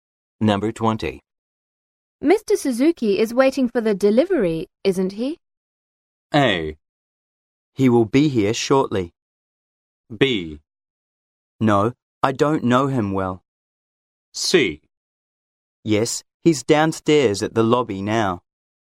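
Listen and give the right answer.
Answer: C: Yes, he's downstairs at the lobby now.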